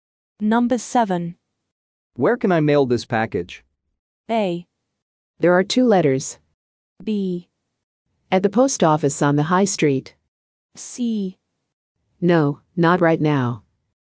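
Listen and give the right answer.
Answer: B: At the post office on the high street.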